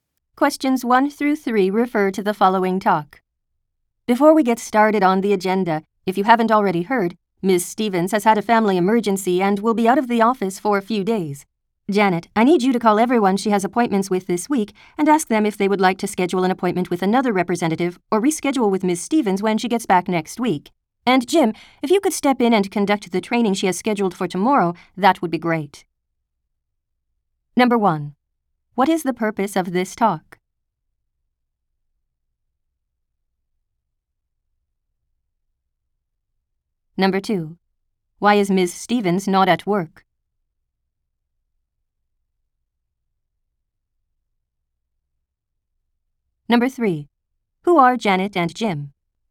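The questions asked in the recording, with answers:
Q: Why is Ms. Stevens not at work?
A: She has had a family emergency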